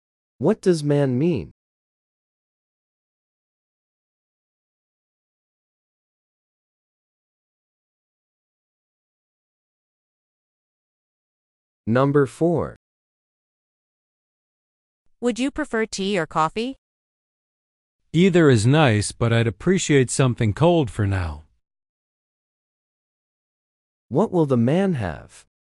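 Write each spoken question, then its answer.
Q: What will the man have?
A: A cold drink.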